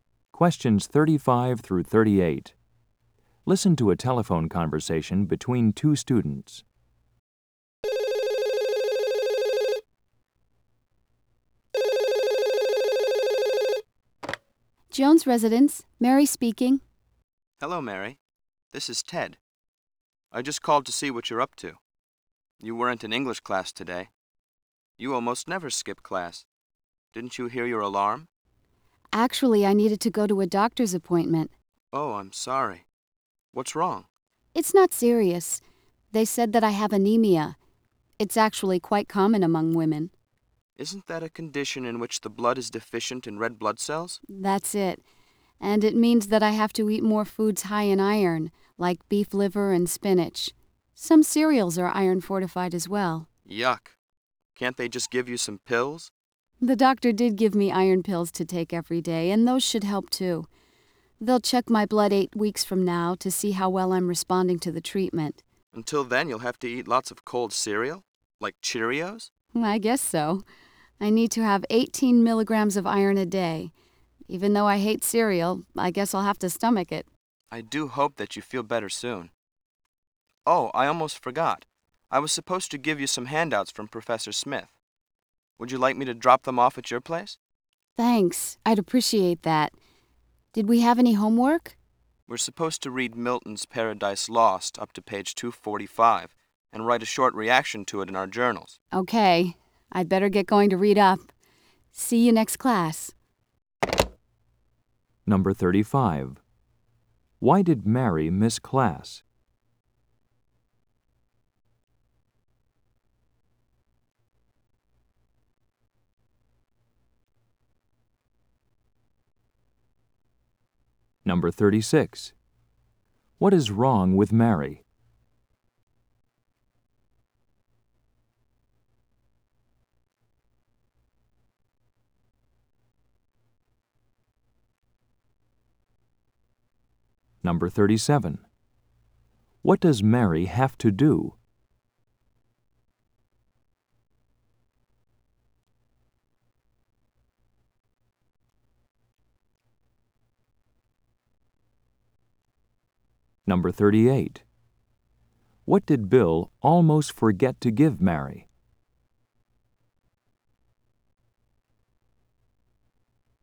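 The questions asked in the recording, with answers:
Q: Why did Mary miss class?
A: She had a doctor's appointment

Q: What is wrong with Mary?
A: She has anemia

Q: What does Mary have to do?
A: Eat foods high in iron and take iron pills

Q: What did Bill almost forget to give Mary?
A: Handouts from Professor Smith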